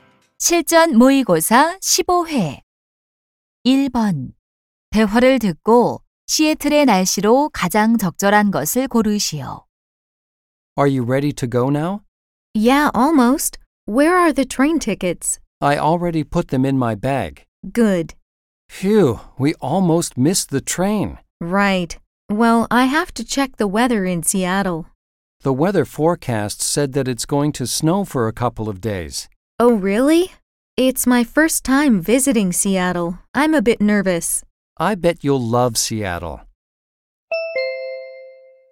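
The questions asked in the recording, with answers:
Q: 대화를 듣고 시애틀의 날씨로 가장 적절한 것을 고르시오.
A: 눈이 온다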